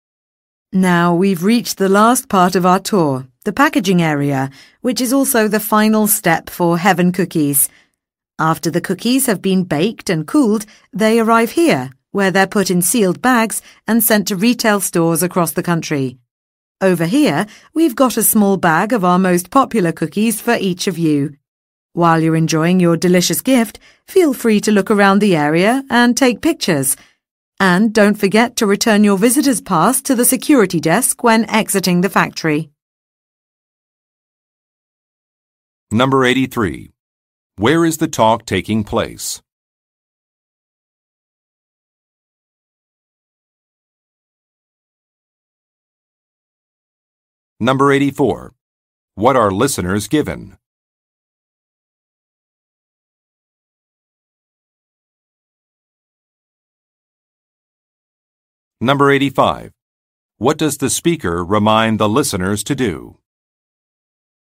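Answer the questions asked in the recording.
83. At a cookie factory (packaging area)
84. A small bag of cookies
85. Return their visitor's pass to the security desk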